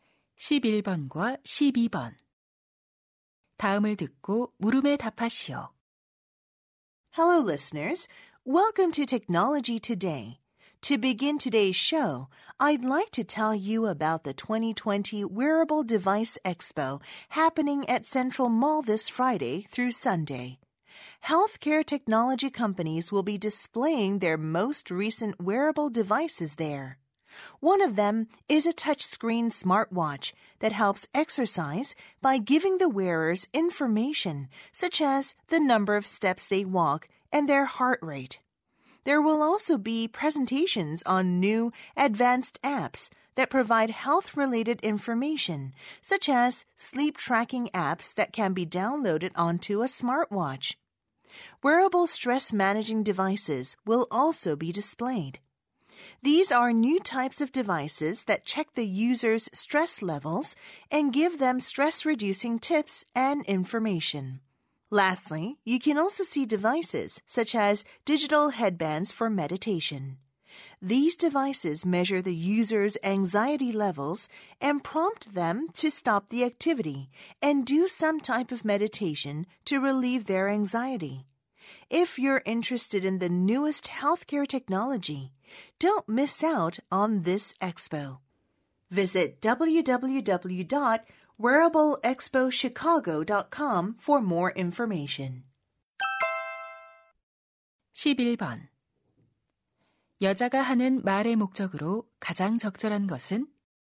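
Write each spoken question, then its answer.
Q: 여자가 하는 말의 목적으로 가장 적절한 것은?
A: 웨어러블 기기 박람회 홍보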